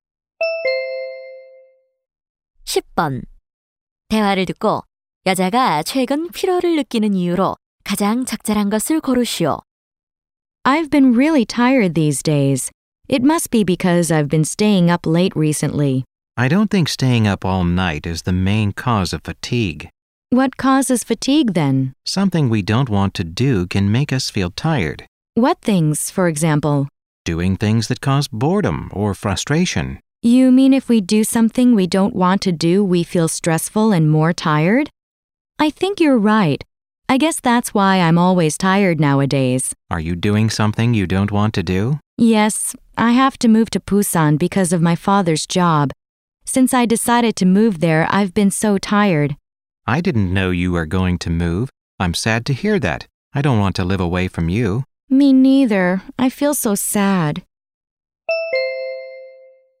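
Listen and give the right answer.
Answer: 아버지 직장 때문에 원치 않는 부산 이사를 해야 해서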